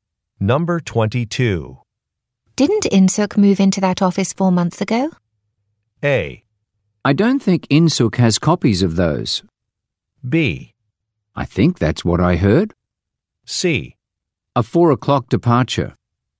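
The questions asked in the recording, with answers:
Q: Didn't Insook move into that office 4 months ago?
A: B: I think that's what I heard.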